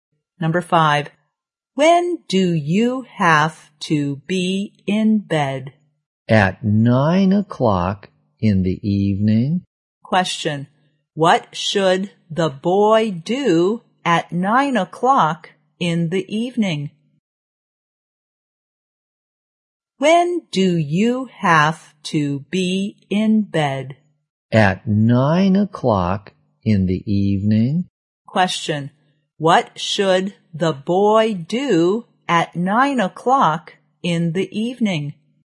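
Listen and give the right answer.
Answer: Go to bed.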